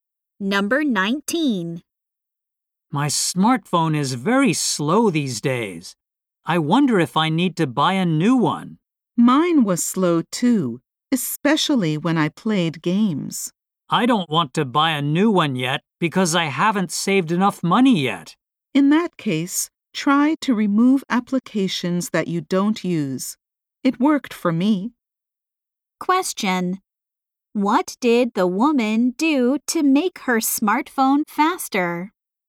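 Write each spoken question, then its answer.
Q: What did the woman do to make her smartphone faster?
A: She removed applications she didn't use.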